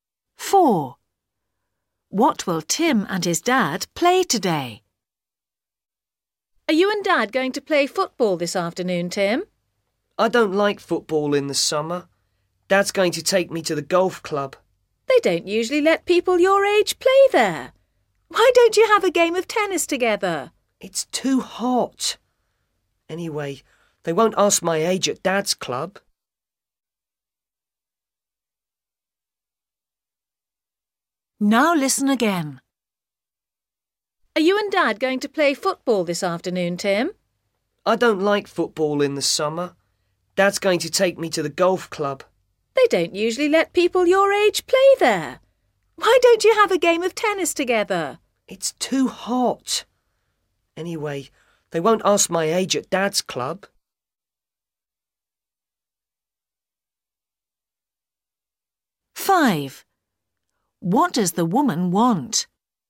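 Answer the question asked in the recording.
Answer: Golf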